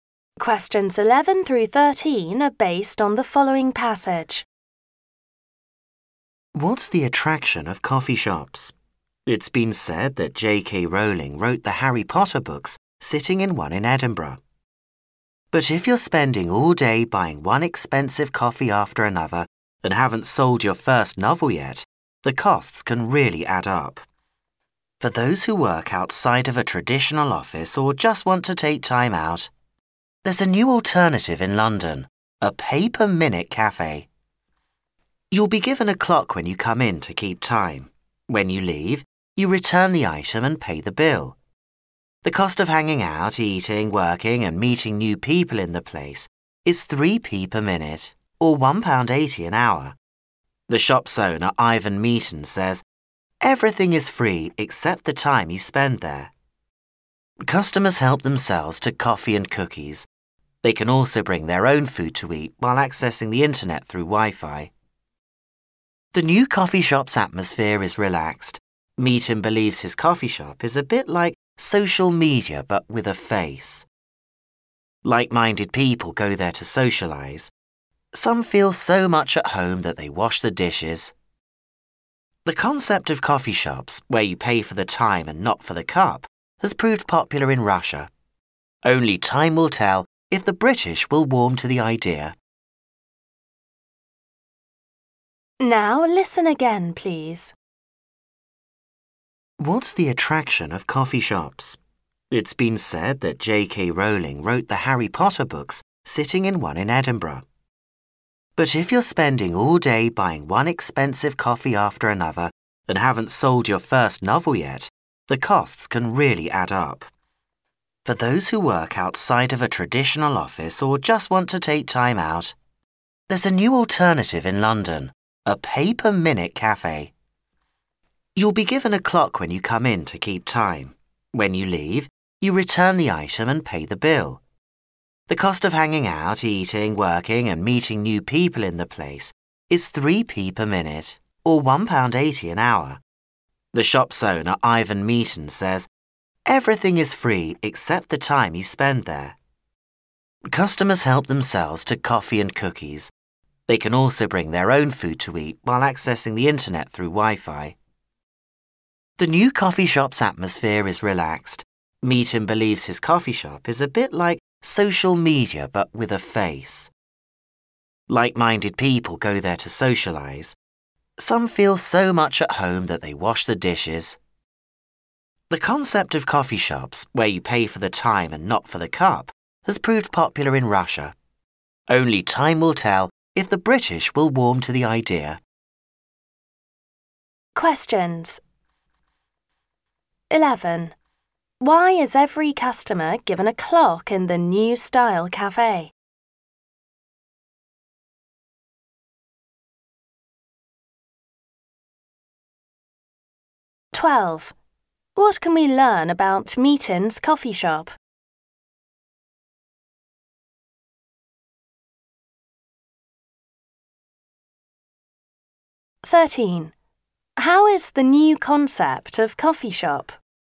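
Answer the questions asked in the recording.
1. To keep track of their time, since they pay by the minute
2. Everything is free except the time spent there; the atmosphere is relaxed
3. It is popular in Russia, but it is unknown whether it will catch on in Britain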